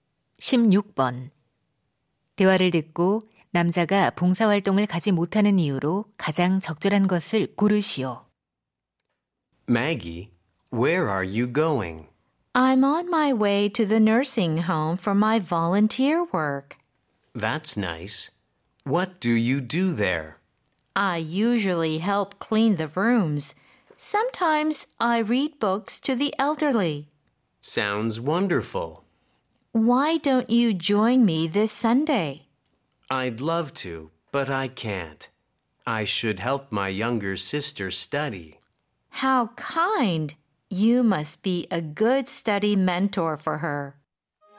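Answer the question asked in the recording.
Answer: 여동생 공부를 도와야 해서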